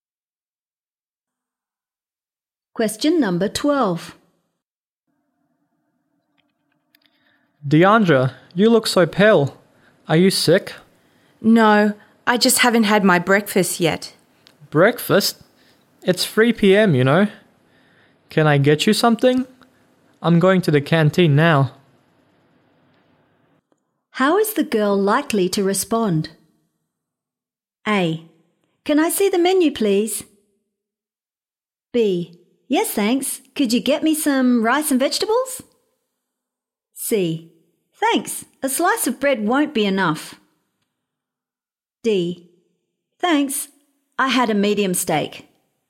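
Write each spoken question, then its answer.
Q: How is the girl likely to respond?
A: B: Yes, thanks. Could you get me some rice and vegetables?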